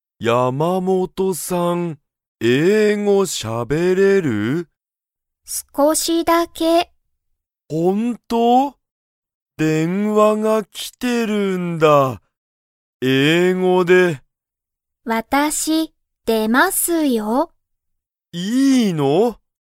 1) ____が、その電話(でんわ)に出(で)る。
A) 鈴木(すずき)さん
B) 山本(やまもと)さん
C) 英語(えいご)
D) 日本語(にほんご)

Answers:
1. 山本(やまもと)さん

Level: Level 1

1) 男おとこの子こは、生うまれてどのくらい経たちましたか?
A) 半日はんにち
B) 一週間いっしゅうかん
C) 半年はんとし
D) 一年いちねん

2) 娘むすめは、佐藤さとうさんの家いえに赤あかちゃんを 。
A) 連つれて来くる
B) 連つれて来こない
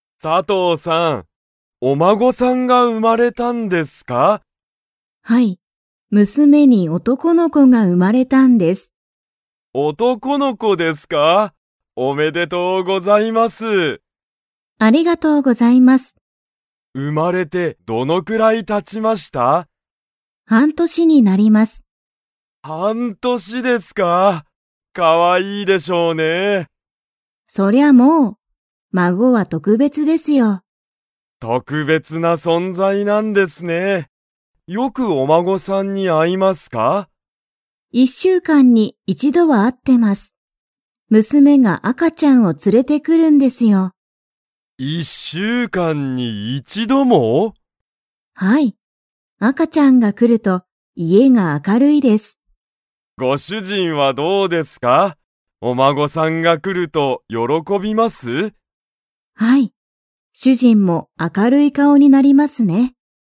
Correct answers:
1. 半年はんとし
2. 連つれて来くる

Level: Level 4

